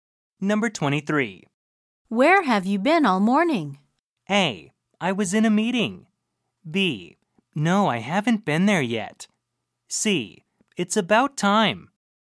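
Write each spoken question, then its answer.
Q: Where have you been all morning?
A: A: I was in a meeting.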